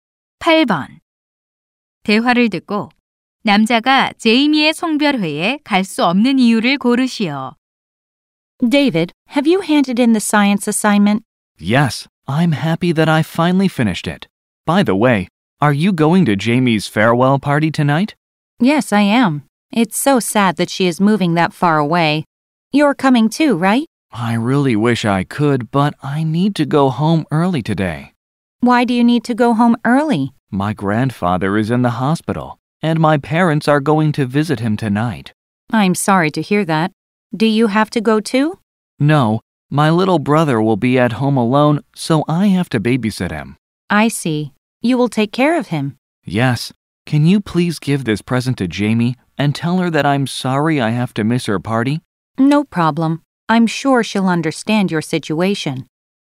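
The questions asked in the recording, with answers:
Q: 대화를 듣고 남자가 제이미의 송별회에 갈 수 없는 이유를 고르시오.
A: 남동생을 돌봐야 해서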